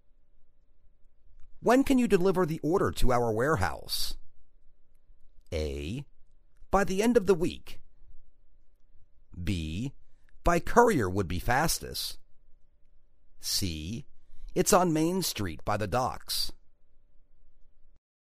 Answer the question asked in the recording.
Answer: By the end of the week.